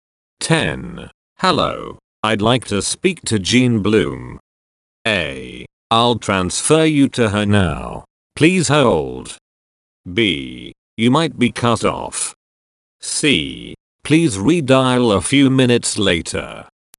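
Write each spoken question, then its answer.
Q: Hello. I'd like to speak to Jean Bloom.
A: A: I'll transfer you to her now. Please hold.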